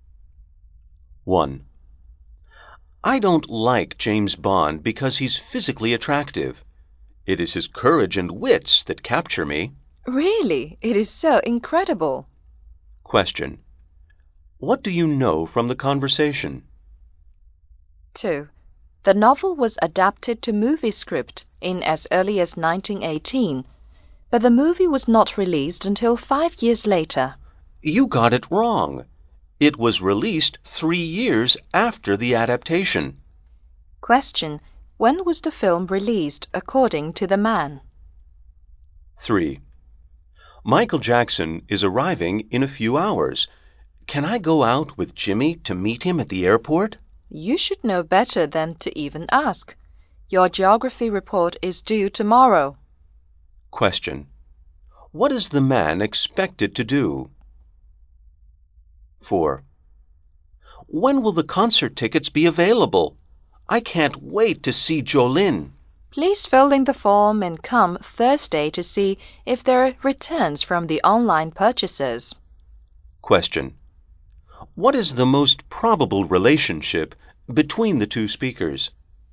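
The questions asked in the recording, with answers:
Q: When was the film released according to the man?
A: In 1921, 3 years after the adaptation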